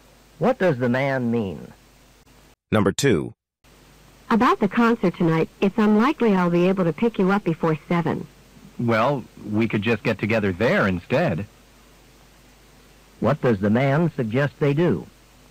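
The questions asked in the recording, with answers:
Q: What does the man suggest they do?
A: Meet at the concert.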